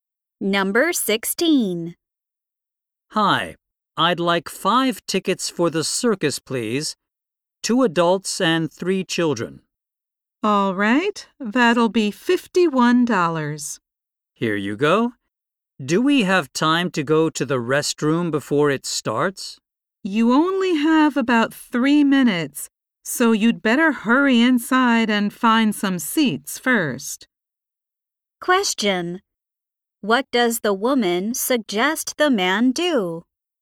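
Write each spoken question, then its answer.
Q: What does the woman suggest the man do?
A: Hurry inside and find some seats first.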